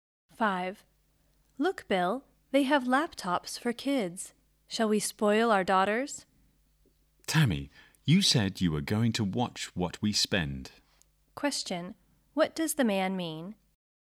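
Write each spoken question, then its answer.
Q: What does the man mean?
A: They shouldn't spend money on the laptops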